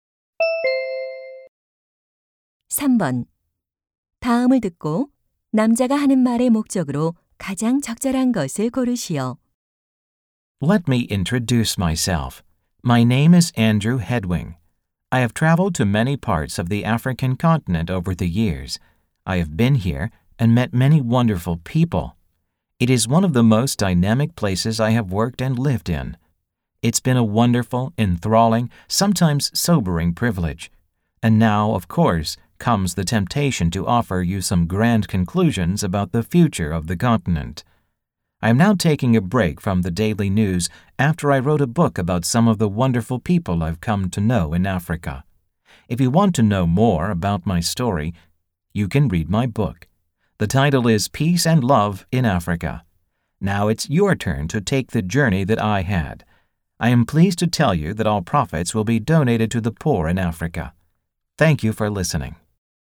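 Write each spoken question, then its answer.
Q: 다음을 듣고 남자가 하는 말의 목적으로 가장 적절한 것을 고르시오.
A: 아프리카에 관한 자신의 책을 홍보하려고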